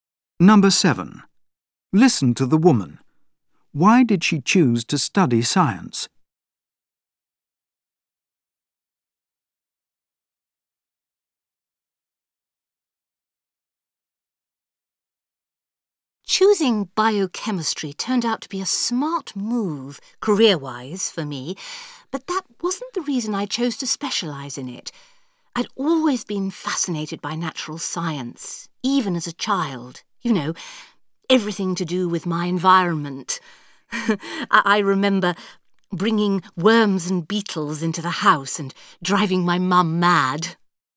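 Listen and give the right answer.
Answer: She had been fascinated by natural science since she was a child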